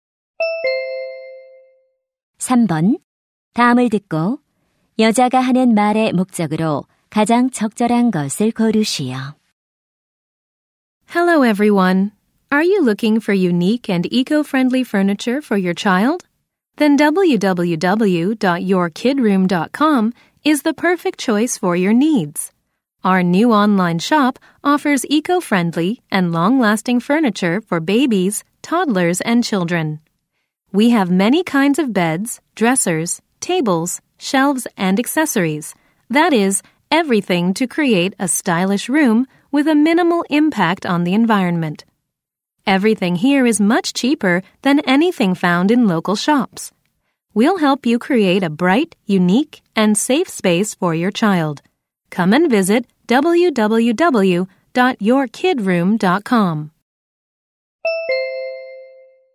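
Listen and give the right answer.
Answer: 친환경 아동 가구 온라인 상점을 광고하려고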